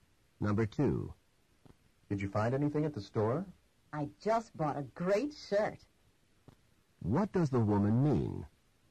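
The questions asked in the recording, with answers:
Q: What does the woman mean?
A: She bought a shirt.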